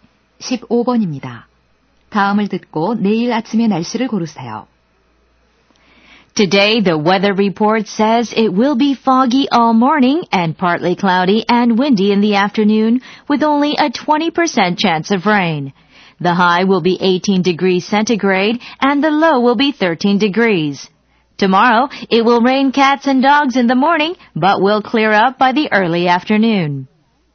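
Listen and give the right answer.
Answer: 비가 많이 옴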